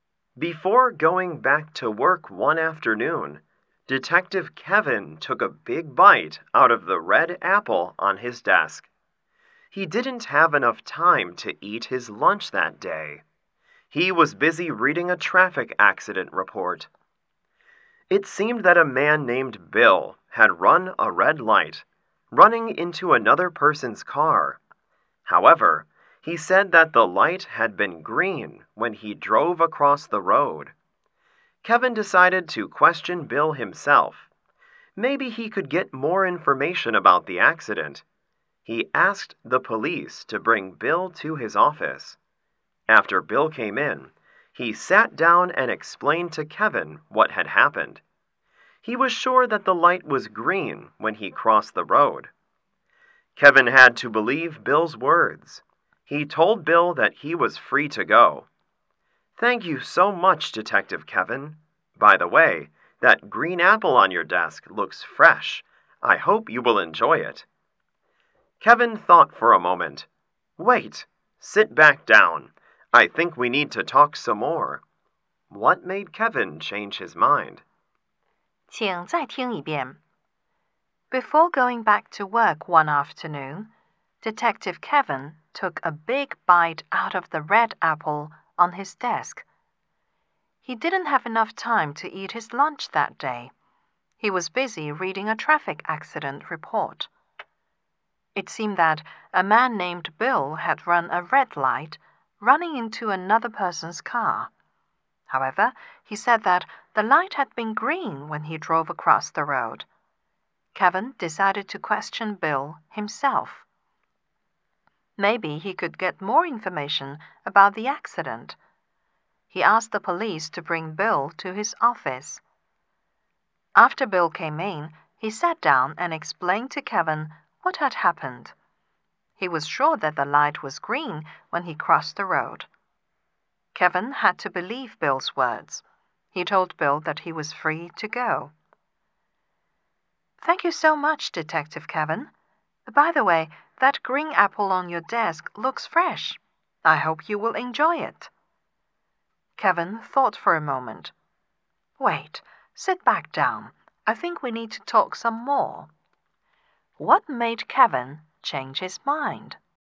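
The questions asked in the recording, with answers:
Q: What made Kevin change his mind?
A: Bill called the red apple green, so he probably can't tell red from green and may have run the red light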